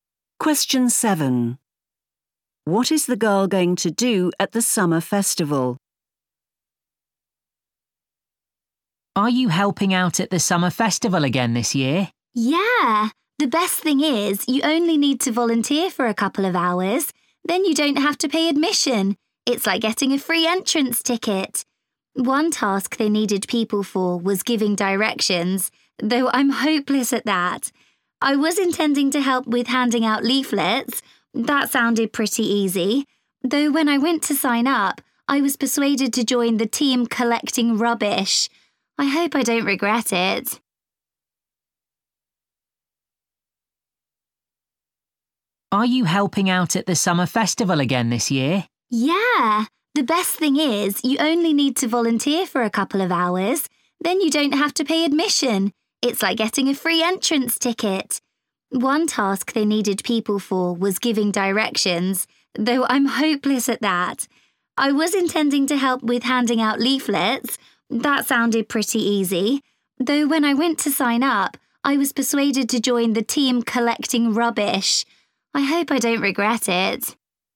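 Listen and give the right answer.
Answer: Collect rubbish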